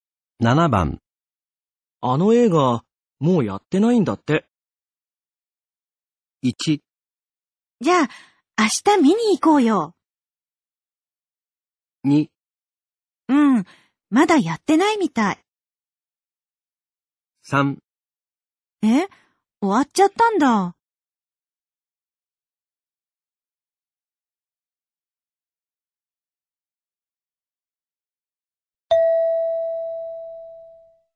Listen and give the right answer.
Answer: 3

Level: N3 Listening · Test 15